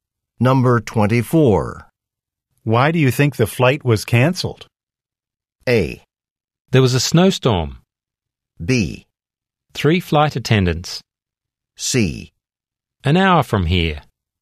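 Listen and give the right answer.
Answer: A: There was a snowstorm.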